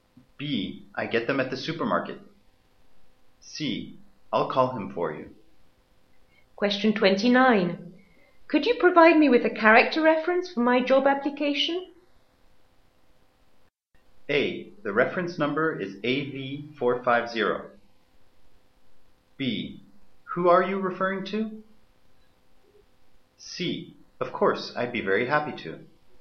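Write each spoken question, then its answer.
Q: Could you provide me with a character reference for my job application?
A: C: Of course, I'd be very happy to.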